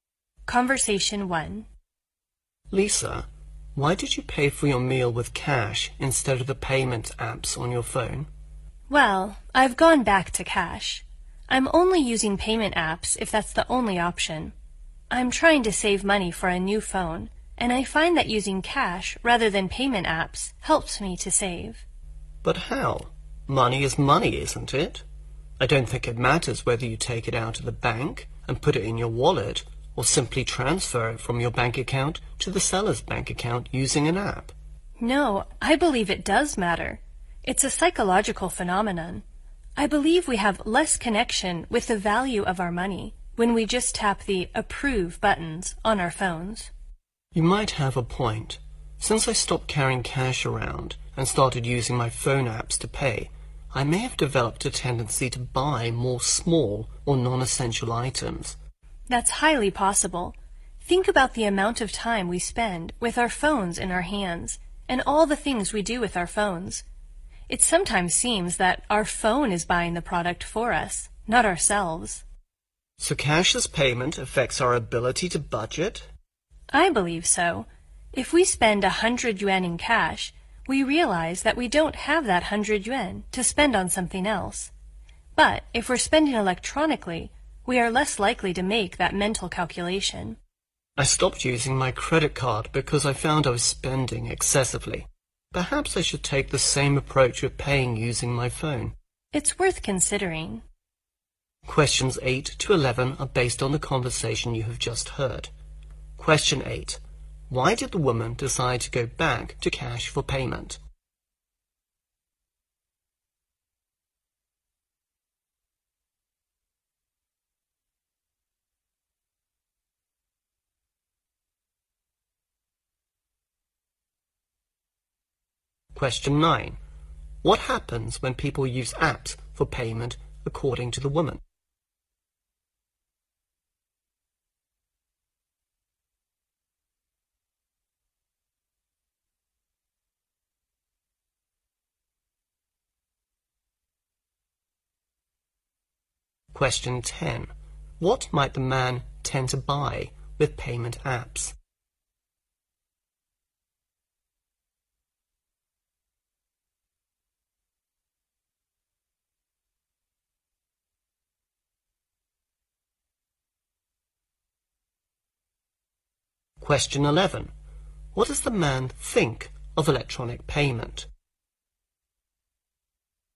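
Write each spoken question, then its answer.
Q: Why did the woman decide to go back to cash for payment?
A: To save money for a new phone

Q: What happens when people use apps for payment according to the woman?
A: They have less connection with the value of their money

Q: What might the man tend to buy with payment apps?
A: More small or non-essential items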